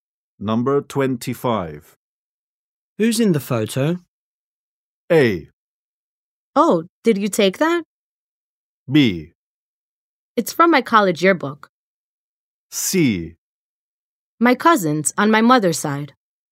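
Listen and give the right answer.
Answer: C: My cousins on my mother's side.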